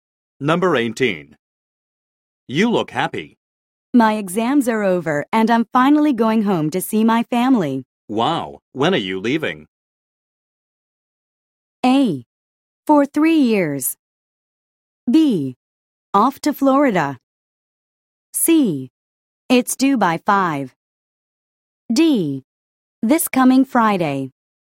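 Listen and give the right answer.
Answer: D: This coming Friday.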